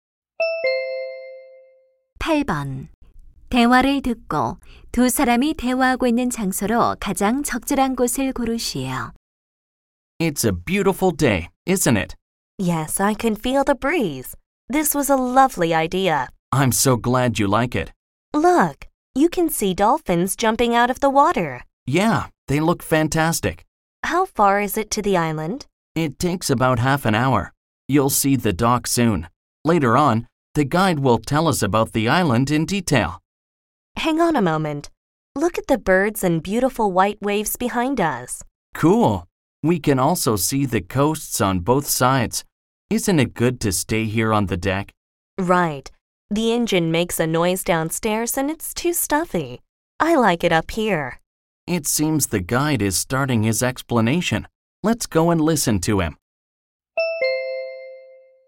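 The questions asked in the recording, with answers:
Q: 대화를 듣고 두 사람이 대화하고 있는 장소로 가장 적절한 곳을 고르시오.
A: 섬으로 가는 배의 갑판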